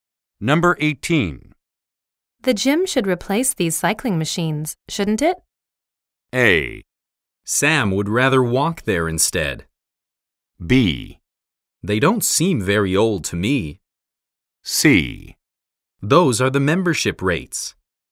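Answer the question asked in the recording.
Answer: B: They don't seem very old to me.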